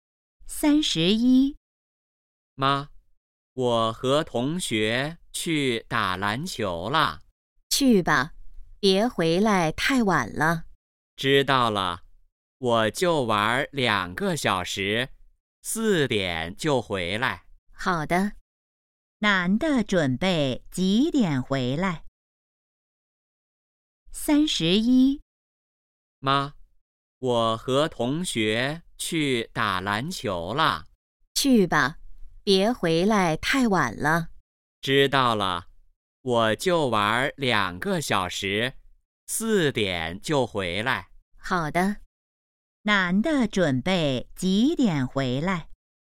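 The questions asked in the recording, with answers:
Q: 男的准备几点回来?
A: 四点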